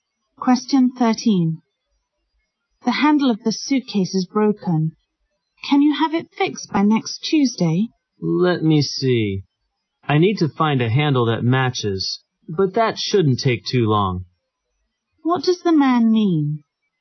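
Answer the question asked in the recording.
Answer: He can fix the suitcase by next Tuesday.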